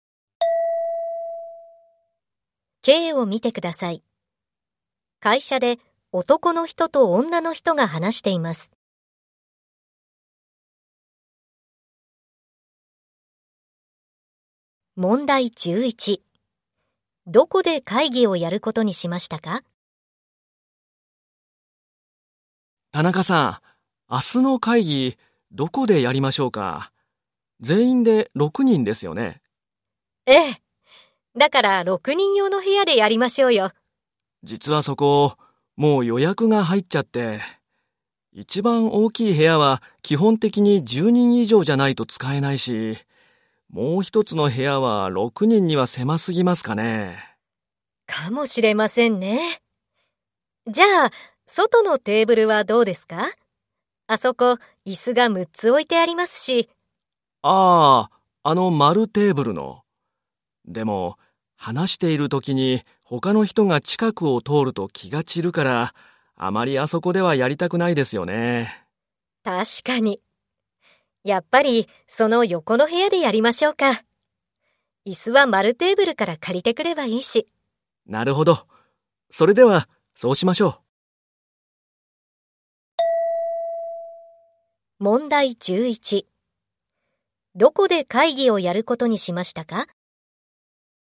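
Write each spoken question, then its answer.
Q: どこで会議をやることにしましたか?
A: 丸テーブルの横の部屋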